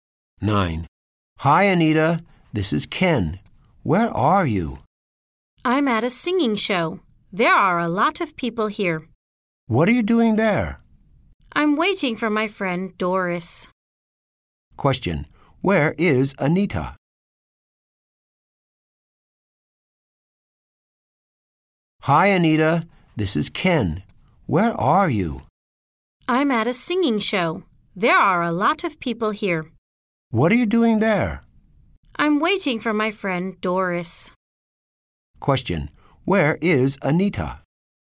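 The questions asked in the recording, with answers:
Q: Where is Anita?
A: At a singing show.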